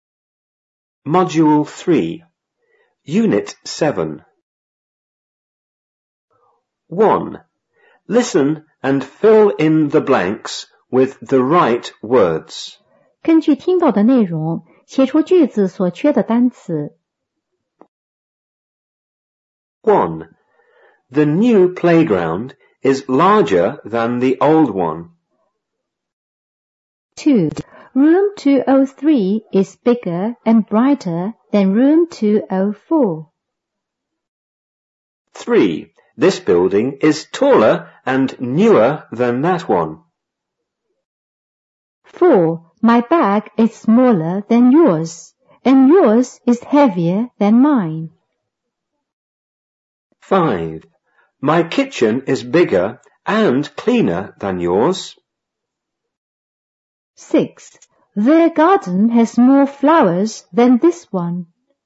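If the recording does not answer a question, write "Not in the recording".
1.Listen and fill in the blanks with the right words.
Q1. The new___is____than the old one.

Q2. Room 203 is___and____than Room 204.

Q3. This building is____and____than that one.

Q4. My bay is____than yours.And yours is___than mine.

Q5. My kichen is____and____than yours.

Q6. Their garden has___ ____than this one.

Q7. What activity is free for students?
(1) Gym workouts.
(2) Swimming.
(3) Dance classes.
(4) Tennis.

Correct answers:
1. playground, larger
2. bigger, brighter
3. taller, newer
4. smaller, heavier
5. bigger, cleaner
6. more flowers
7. Not in the recording

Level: 五年级下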